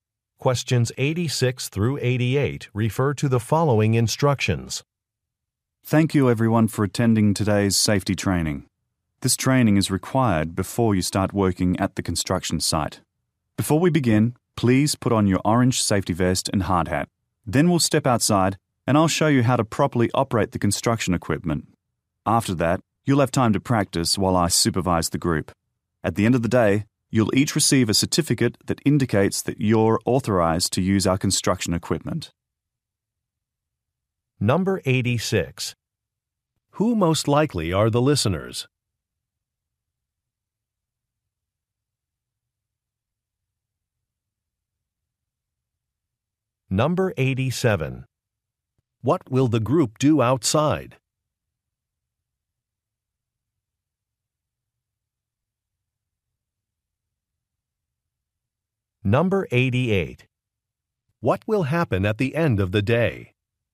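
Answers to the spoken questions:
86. Construction workers
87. Learn to operate construction equipment
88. They will receive certificates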